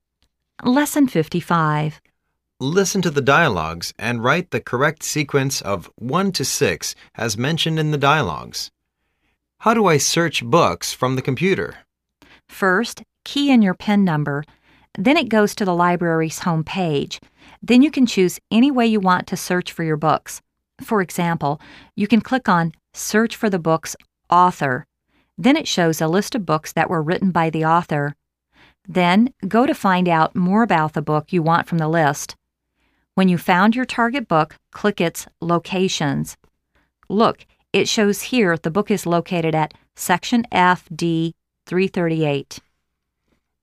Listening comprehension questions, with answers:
Listen to the dialogues and write the correct sequence of 1-6 as mentioned in the dialogues.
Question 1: _____Click your searching tools.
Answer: 2

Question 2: _____Click the book's location.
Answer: 5

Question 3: _____Type in your PIN number.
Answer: 1

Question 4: _____Look into the book you are searching.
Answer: 4

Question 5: _____Key in the book data.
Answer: 3

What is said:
Listen to the dialogues and write the correct sequence of l-6 as mentioned in the dialogues.
A:How do I search books from the computer?
B:First, key in your PIN number. Then, it goes to the Library's Homepage. Then, you can choose any way you want to search for your books. For example, you can click on search for the books' author'. Then, it shows a list of books that were written by the author. Then, go to find out more about the book you want from the list. When you found your target book, click its 'Locations". Look, it shows here the book is located at Section F D338.